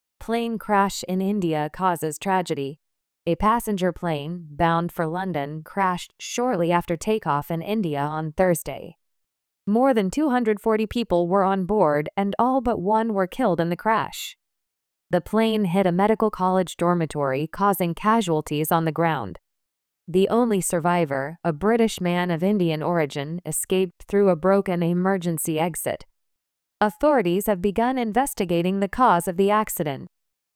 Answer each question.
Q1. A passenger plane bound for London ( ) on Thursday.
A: crashed shortly after takeoff in India

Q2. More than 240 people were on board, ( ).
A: and all but one were killed in the crash

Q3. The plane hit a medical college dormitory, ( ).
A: causing casualties on the ground

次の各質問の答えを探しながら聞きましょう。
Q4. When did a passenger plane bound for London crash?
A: It crashed shortly after takeoff in India on Thursday.

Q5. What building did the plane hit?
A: It hit a medical college dormitory.

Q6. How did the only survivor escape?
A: He escaped through a broken emergency exit.

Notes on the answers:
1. ▶「crashed(墜落した)」を「crushed(粉砕した)」と混同してしまった。 ⇒ 綴り・発音・意味のいずれも紛らわしい動詞ですが、「飛行機の墜落」「自動車・列車の衝突」などの事故では必ず「crash(墜落する・衝突する)」という動詞を使います。
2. ▶ 「all but one(ひとりを除いて全員)」の意味がわからず、正確に聞き取れなかった。 ⇒ この場合の but は「しかし」ではなく、「〜以外」のという意味の前置詞です。
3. ▶ 「casualties(死傷者たち)」を「casualty」と単数形で書いてしまった。 ⇒「casualty」は可算名詞(数えられる名詞)なので、「1人の死傷者」を表すときは単数ですが、死傷者が2人以上いる場合は複数形になります。

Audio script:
Plane Crash in India Causes Tragedy
A passenger plane bound for London crashed shortly after takeoff in India on Thursday.
More than 240 people were on board, and all but one were killed in the crash.
The plane hit a medical college dormitory, causing casualties on the ground.
The only survivor, a British man of Indian origin, escaped through a broken emergency exit.
Authorities have begun investigating the cause of the accident.

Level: 標準レベル